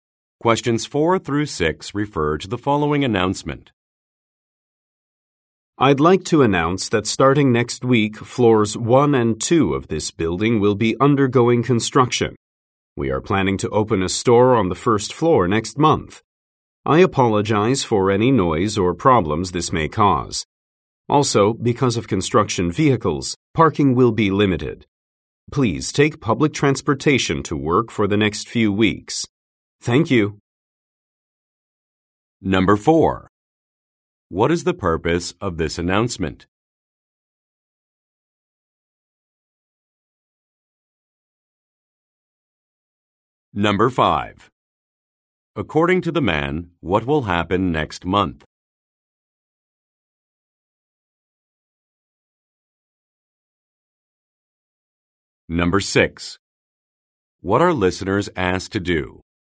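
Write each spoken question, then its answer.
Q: What is the purpose of this announcement?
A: To announce construction on floors 1 and 2

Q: According to the man, what will happen next month?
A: A store will open on the first floor

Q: What are listeners asked to do?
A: Take public transportation to work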